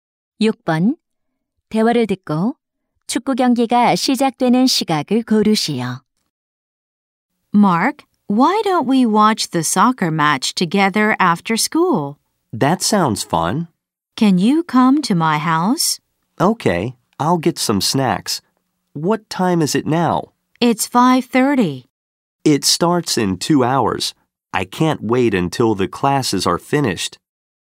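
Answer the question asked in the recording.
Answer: 7시 30분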